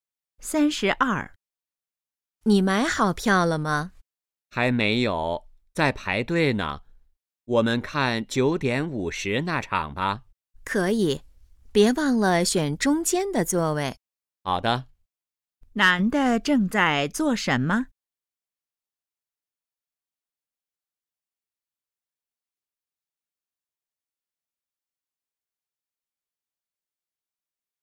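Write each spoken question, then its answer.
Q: 男的正在做什么?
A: 排队买票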